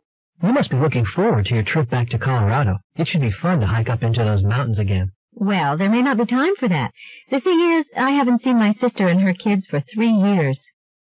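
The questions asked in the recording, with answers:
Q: What does the woman imply?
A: She will spend her time with her sister and her kids, and may not have time to hike.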